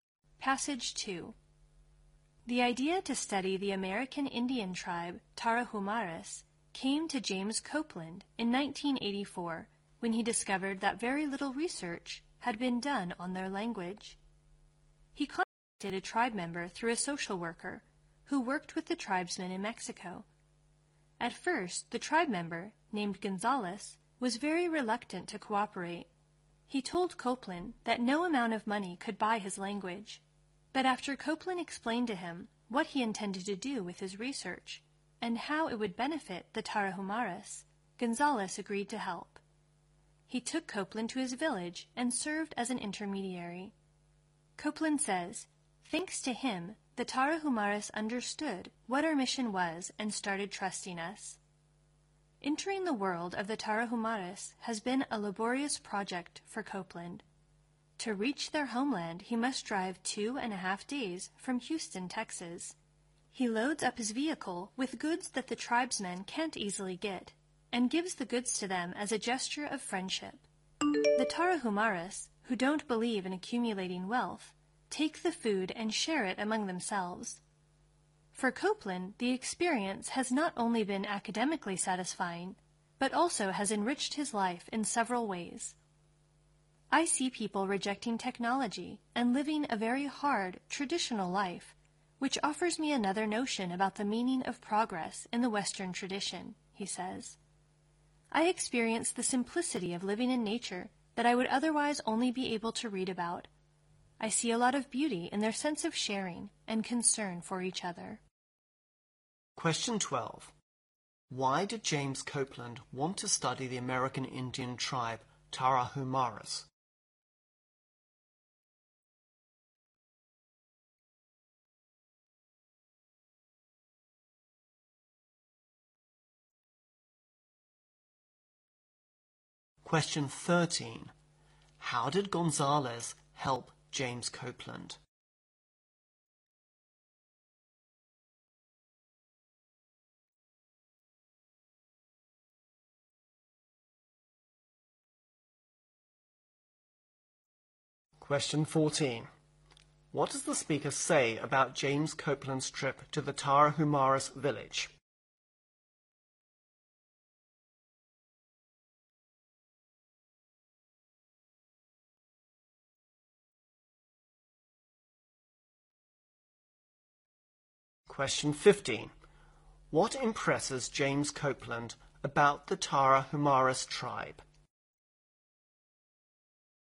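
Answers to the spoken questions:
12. Very little research had been done on their language.
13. He took Copeland to his village and acted as an intermediary, so the tribe came to trust him.
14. It is laborious: a 2.5-day drive from Houston.
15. Their sense of sharing and concern for each other.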